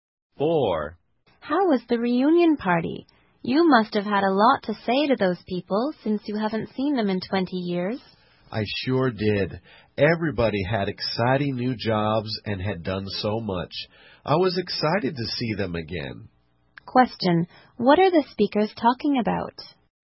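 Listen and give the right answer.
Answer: A reunion party with old friends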